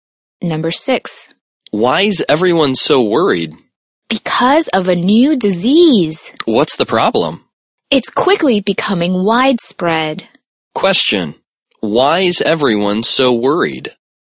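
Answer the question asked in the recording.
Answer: A new disease is quickly becoming widespread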